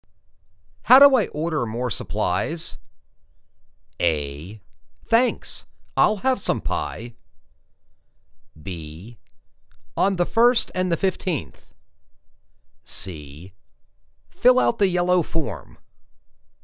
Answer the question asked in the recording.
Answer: Fill out the yellow form.